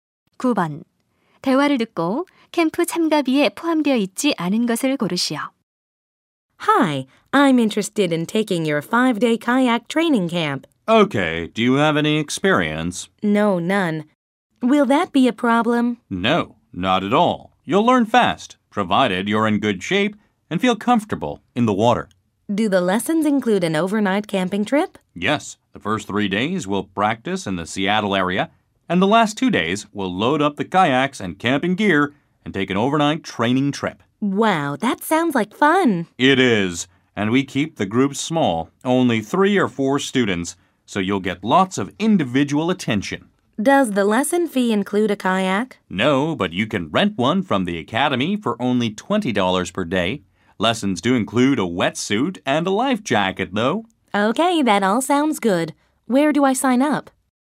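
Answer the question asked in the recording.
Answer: 카약 대여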